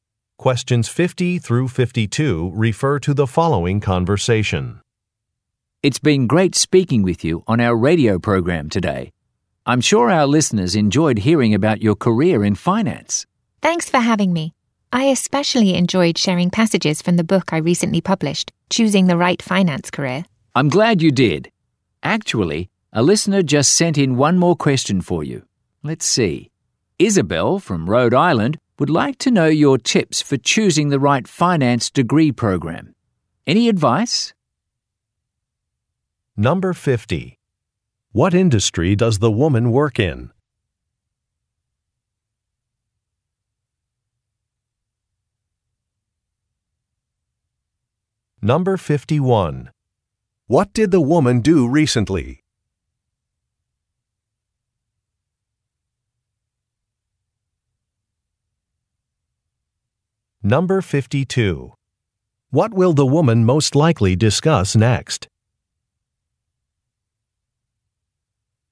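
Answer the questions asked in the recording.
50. Finance
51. She published a book
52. Tips for choosing a finance degree program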